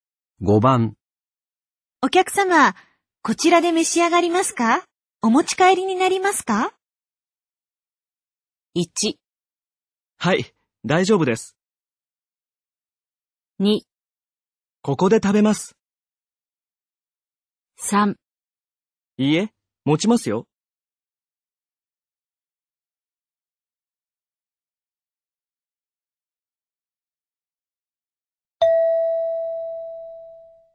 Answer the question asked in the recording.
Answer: 2

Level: N3 Listening · Test 15